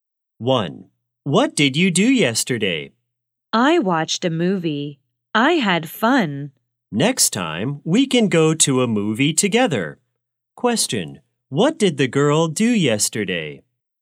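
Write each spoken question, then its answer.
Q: Question, what did the girl do yesterday?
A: She watched a movie.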